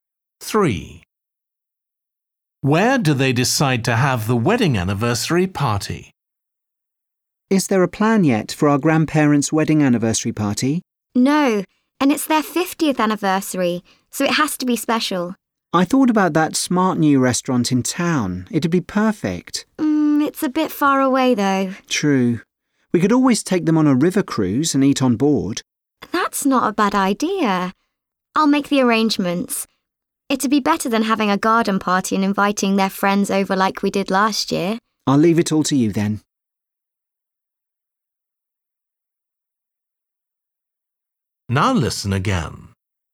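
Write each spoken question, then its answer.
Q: Where do they decide to have the wedding anniversary party?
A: On a river cruise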